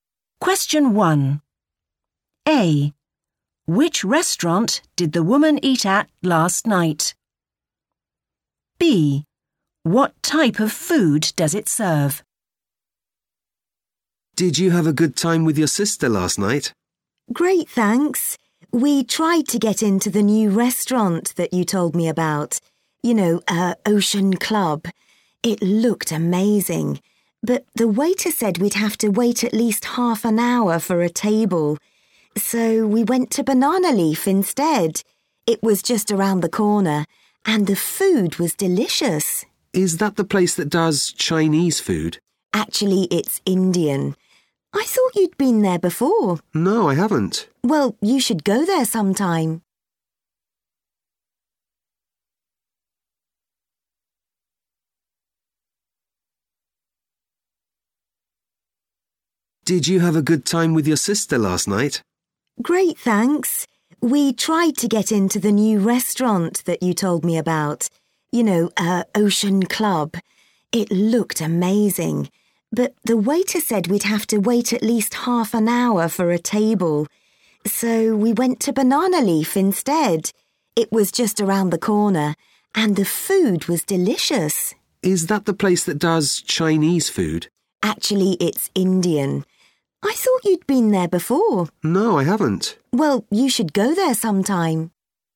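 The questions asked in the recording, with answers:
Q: Which restaurant did the woman eat at last night?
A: Banana Leaf

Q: What type of food does it serve?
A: Indian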